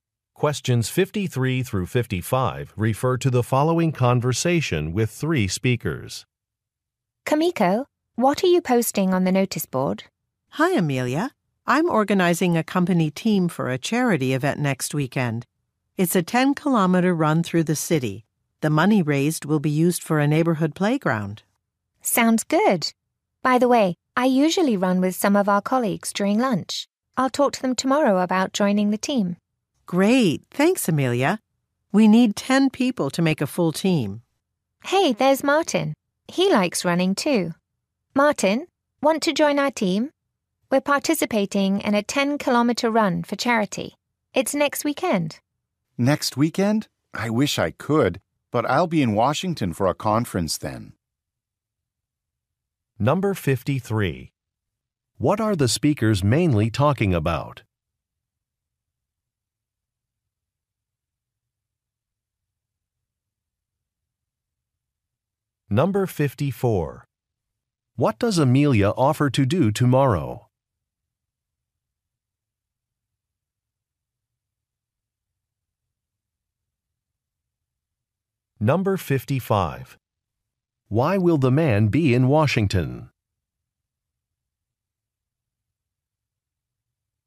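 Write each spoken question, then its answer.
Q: What are the speakers mainly talking about?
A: A charity run

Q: What does Amelia offer to do tomorrow?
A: Talk to colleagues about joining the team

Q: Why will the man be in Washington?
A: To attend a conference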